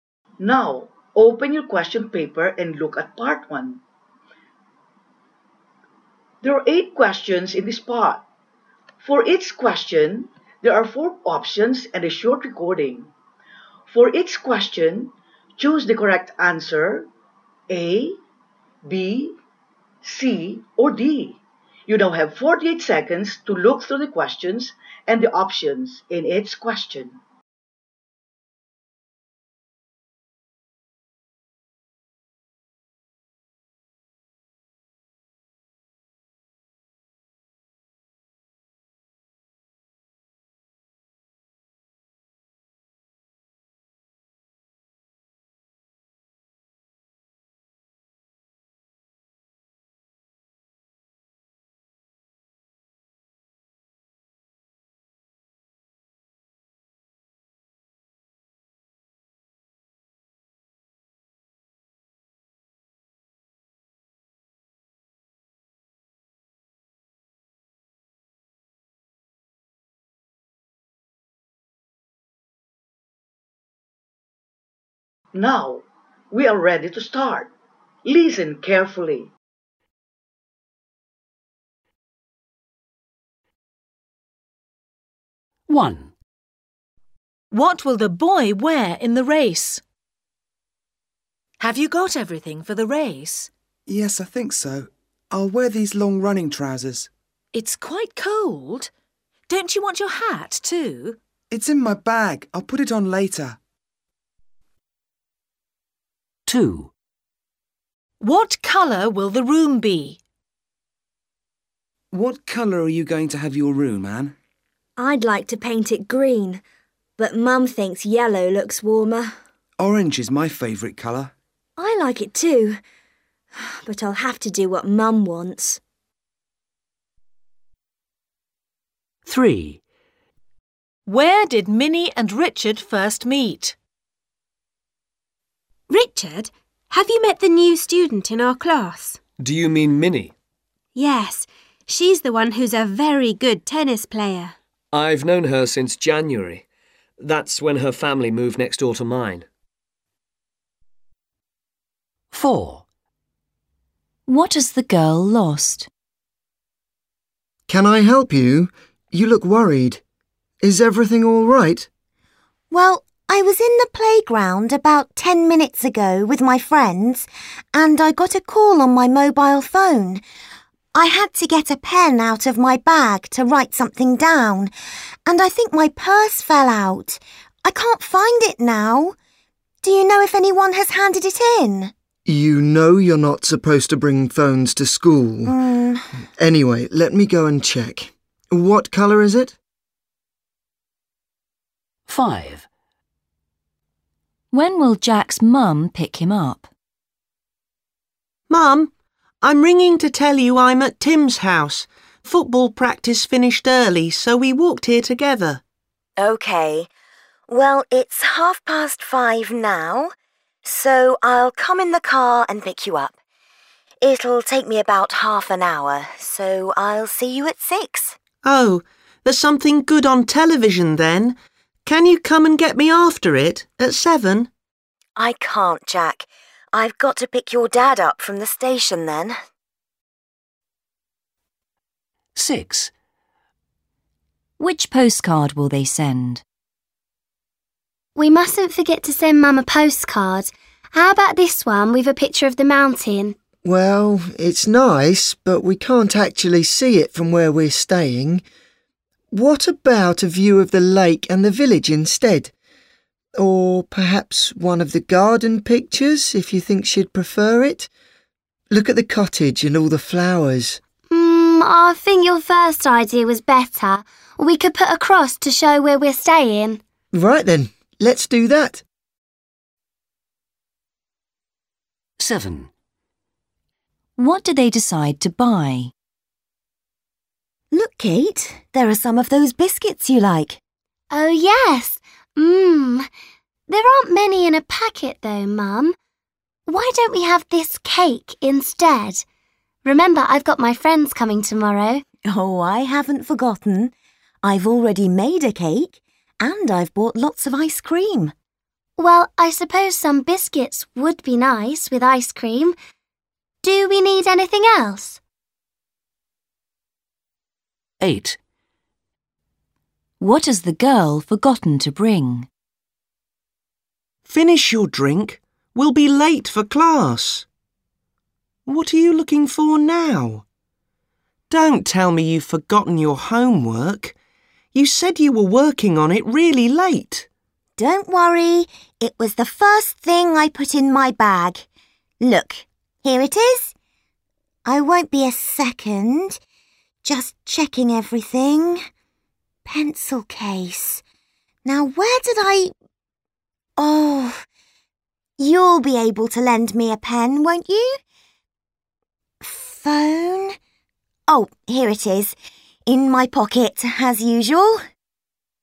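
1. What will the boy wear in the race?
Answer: the long running trousers with a hat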